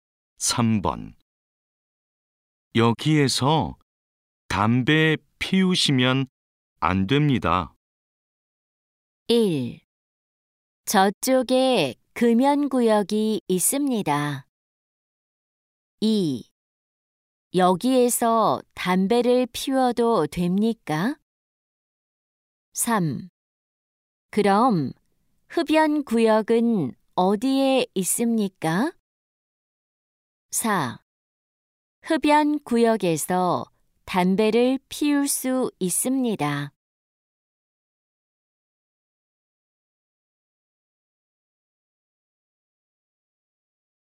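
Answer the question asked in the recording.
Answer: 3: 그럼 흡연구역은 어디에 있습니까?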